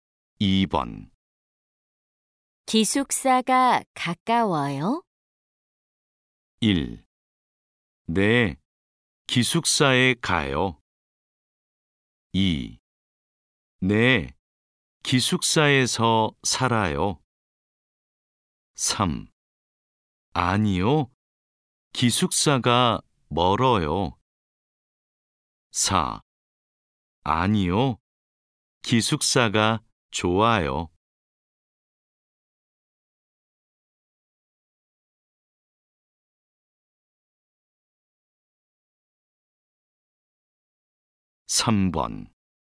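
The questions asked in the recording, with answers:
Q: 기숙사가 가까워요?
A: 3: 아니요, 기숙사가 멀어요.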